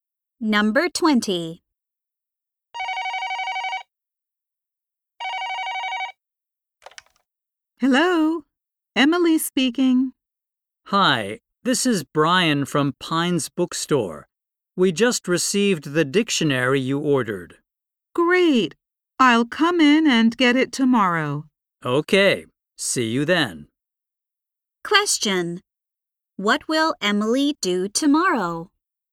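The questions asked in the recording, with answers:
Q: What will Emily do tomorrow?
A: Go to the bookstore to get her dictionary.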